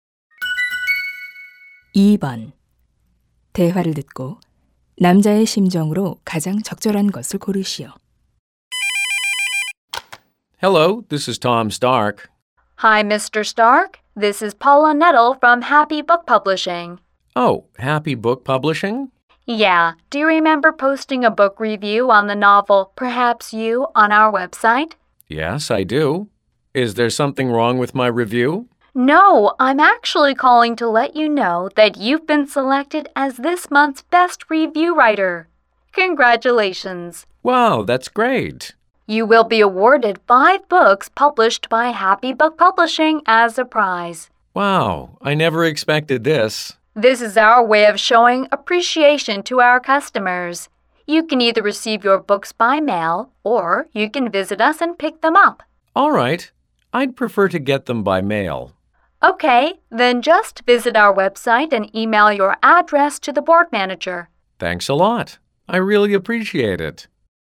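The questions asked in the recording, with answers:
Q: 대화를 듣고 남자의 심정으로 가장 적절한 것을 고르시오.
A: 기쁘고 놀람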